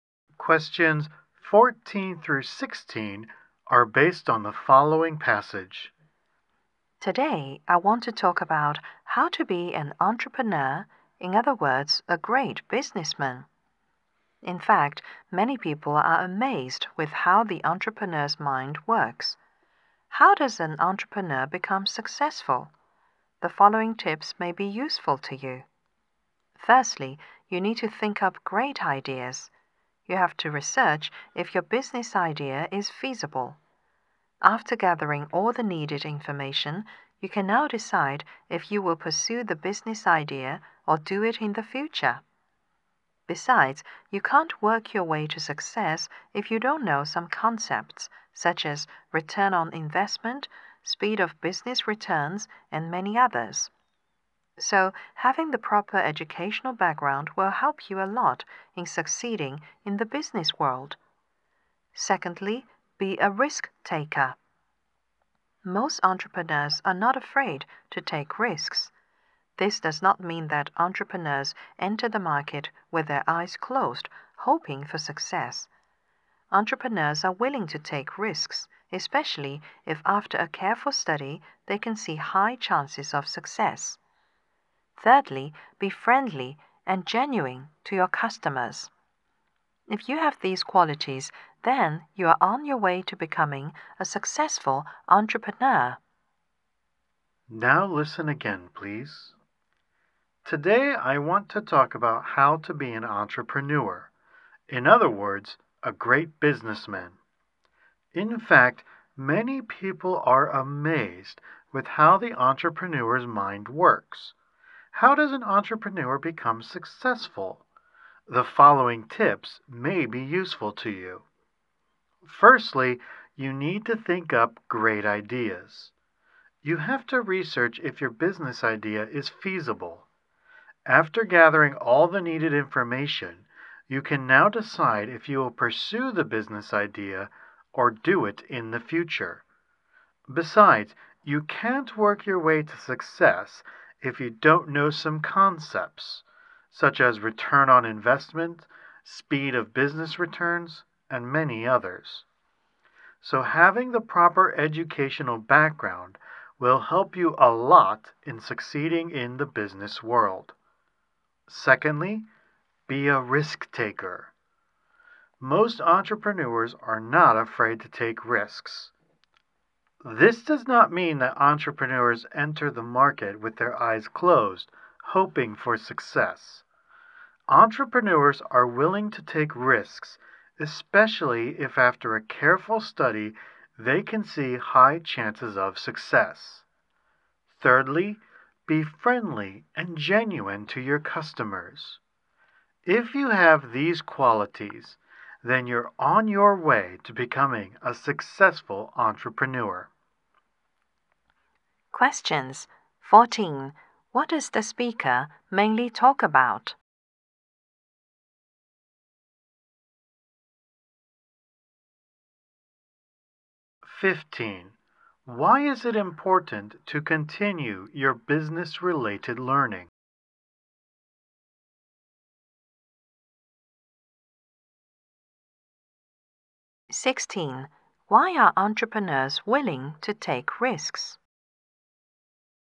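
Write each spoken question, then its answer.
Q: What does the speaker mainly talk about?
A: How to become a successful entrepreneur

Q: Why is it important to continue your business-related learning?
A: You need to know business concepts to succeed

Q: Why are entrepreneurs willing to take risks?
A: Careful study shows high chances of success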